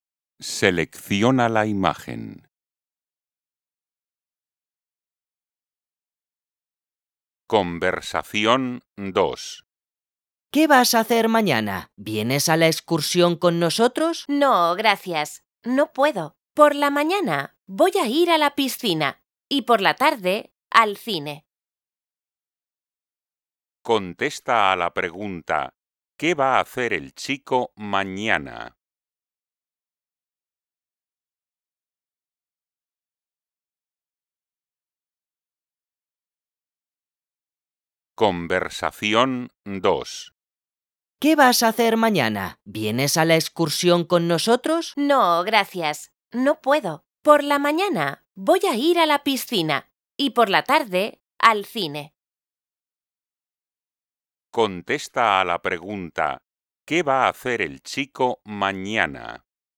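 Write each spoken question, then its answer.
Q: ¿qué va a hacer el chico mañana?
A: ir a la piscina por la mañana y al cine por la tarde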